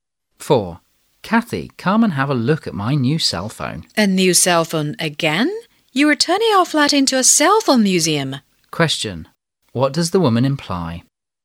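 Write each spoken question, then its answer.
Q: What does the woman imply?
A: The man has too many cell phones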